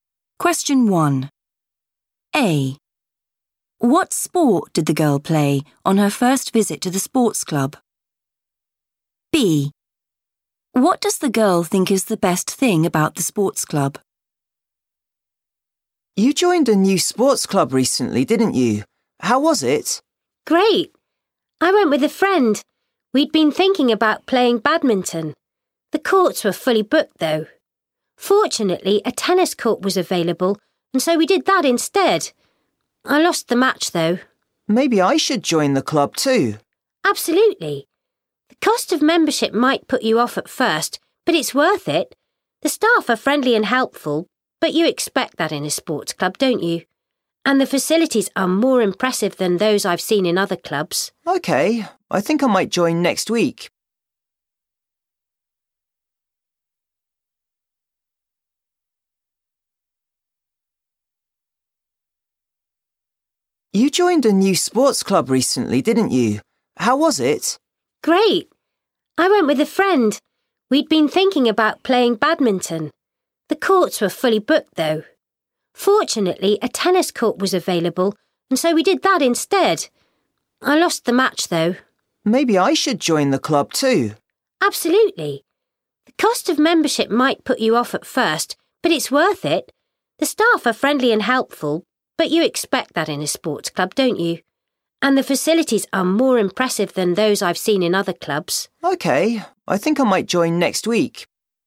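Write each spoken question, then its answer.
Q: What sport did the girl play on her first visit to the sports club?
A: tennis

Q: What does the girl think is the best thing about the sports club?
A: the facilities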